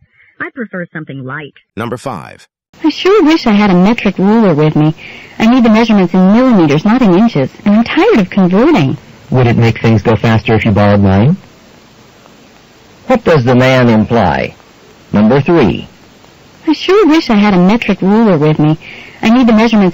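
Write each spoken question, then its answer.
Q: What does the man imply?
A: The woman can borrow his metric ruler.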